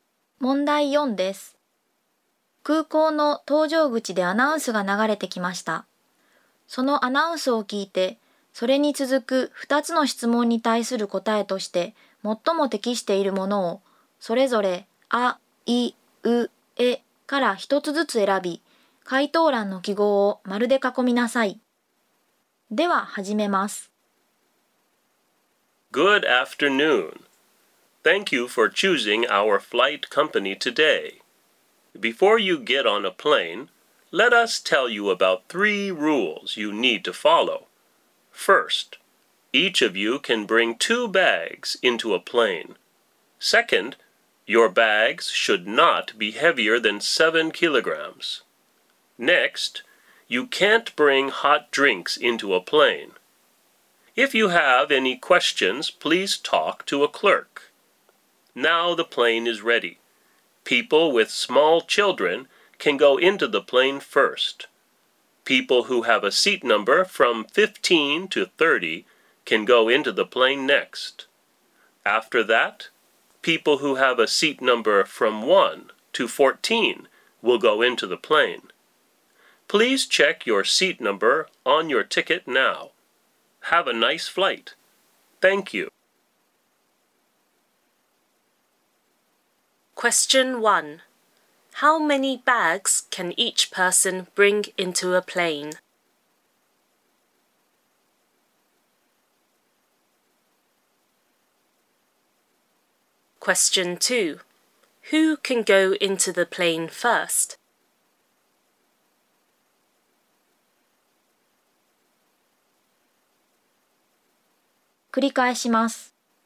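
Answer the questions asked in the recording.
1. Two bags
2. People with small children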